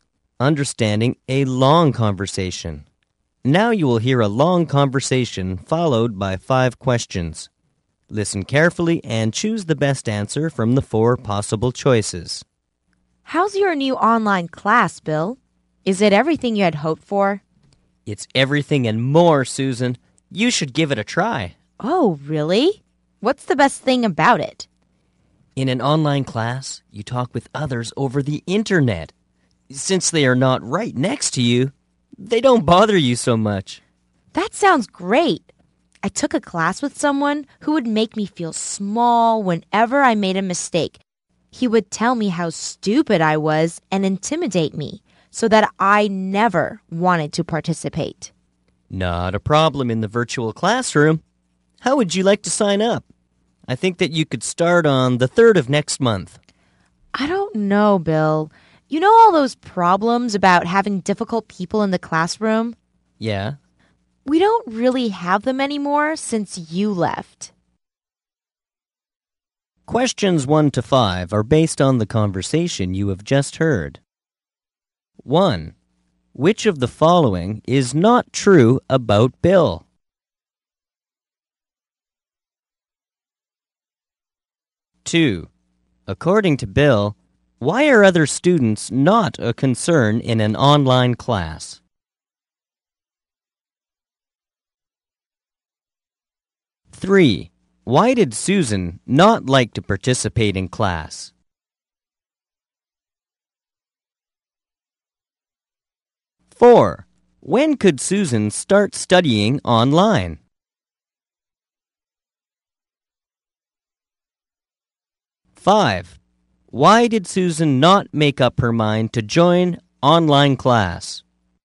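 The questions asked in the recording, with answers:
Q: According to Bill, why are other students not a concern in an online class?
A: They are not right next to you, so they don't bother you much.

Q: Why did Susan not like to participate in class?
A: A classmate made her feel small and intimidated her when she made mistakes.

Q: When could Susan start studying online?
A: On the 3rd of next month.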